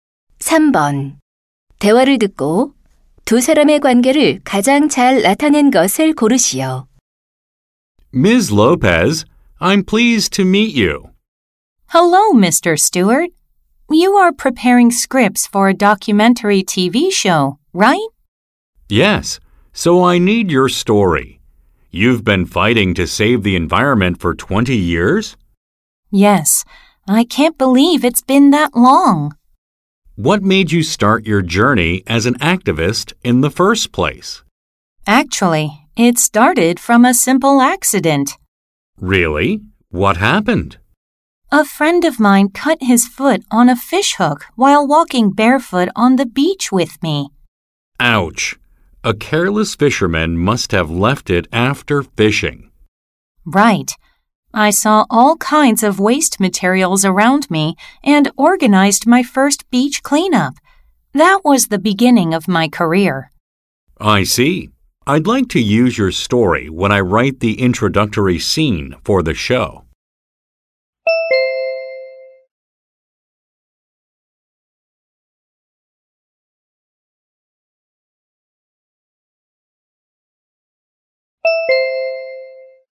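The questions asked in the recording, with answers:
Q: 대화를 듣고 두 사람의 관계를 가장 잘 나타낸 것을 고르시오.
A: 다큐멘터리 방송 작가 – 환경 운동가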